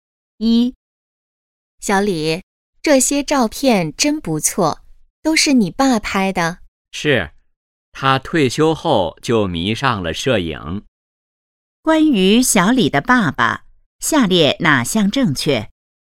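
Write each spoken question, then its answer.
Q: 关于小李的爸爸,下列哪项正确?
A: 他退休后迷上了摄影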